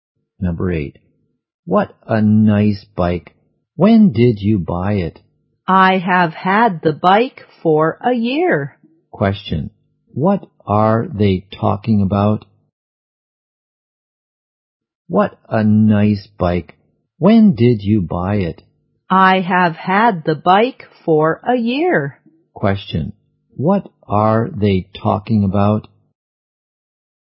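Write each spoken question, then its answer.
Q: Question. What are they talking about?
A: A bike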